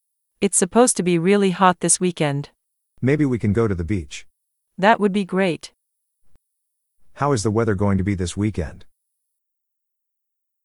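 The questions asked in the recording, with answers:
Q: How is the weather going to be this weekend?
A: Really hot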